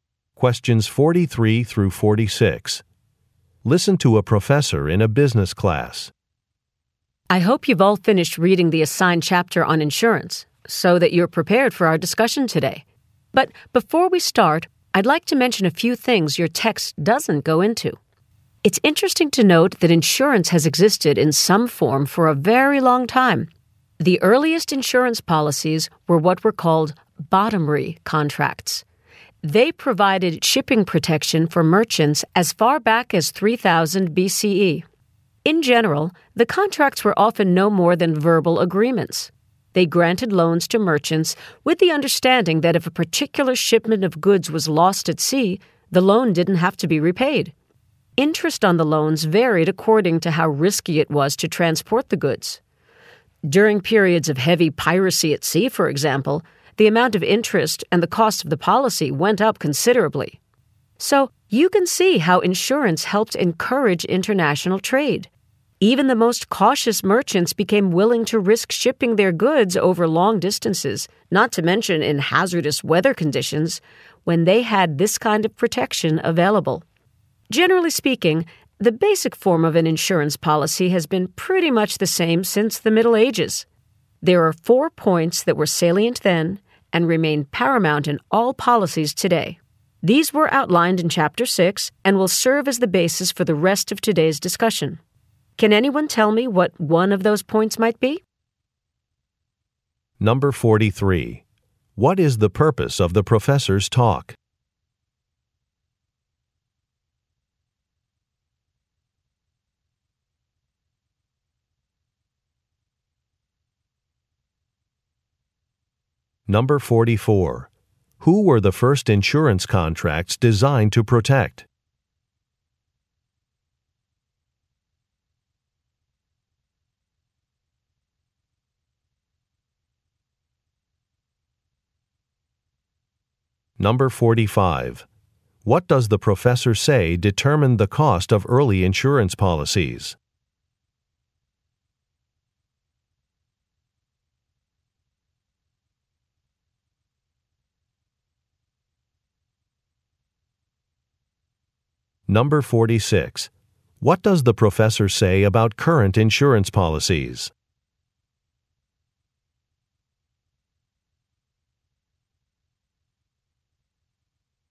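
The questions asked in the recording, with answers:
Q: What is the purpose of the professor's talk?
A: To give background on the history of insurance before the discussion

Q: Who were the first insurance contracts designed to protect?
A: Merchants shipping goods

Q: What does the professor say determined the cost of early insurance policies?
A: How risky it was to transport the goods

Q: What does the professor say about current insurance policies?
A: Their basic form has been much the same since the Middle Ages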